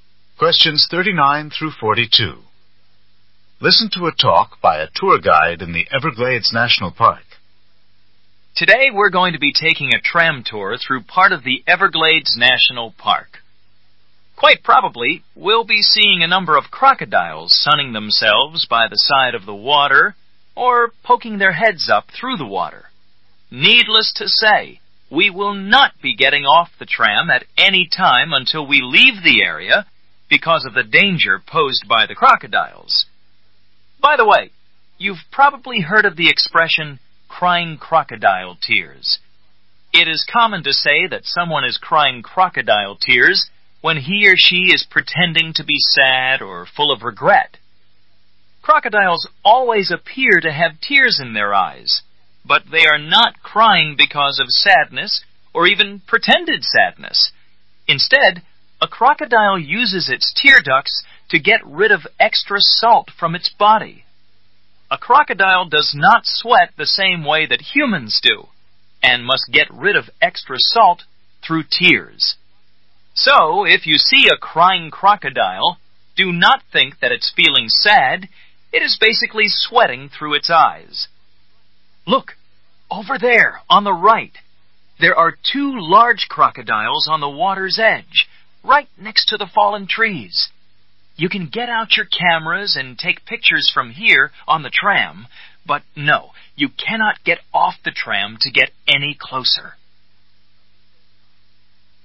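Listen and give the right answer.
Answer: On a tram in the Everglades National Park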